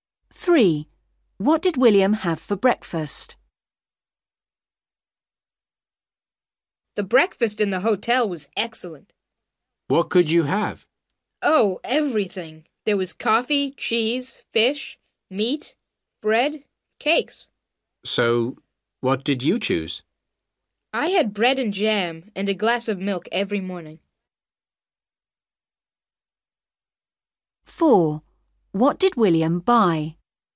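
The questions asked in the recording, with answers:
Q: What did William have for breakfast?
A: Bread and jam and a glass of milk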